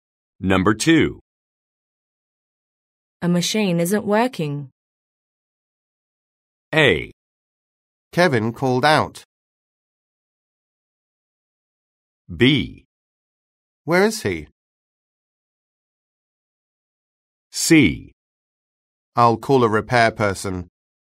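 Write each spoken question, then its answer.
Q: A machine isn't working.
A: C: I'll call a repair person.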